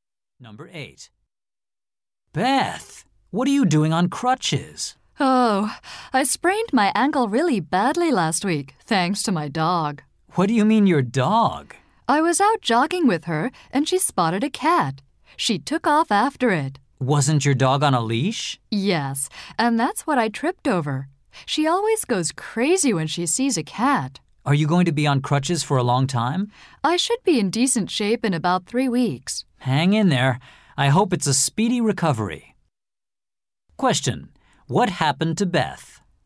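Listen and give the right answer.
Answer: She tripped over her dog's leash and sprained her ankle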